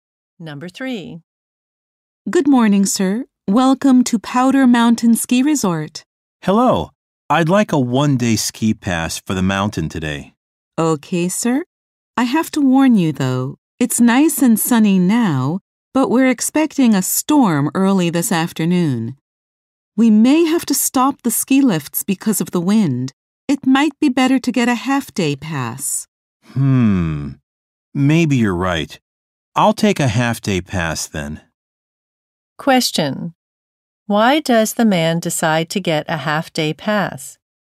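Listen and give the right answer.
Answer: A storm is expected in the afternoon and the lifts may stop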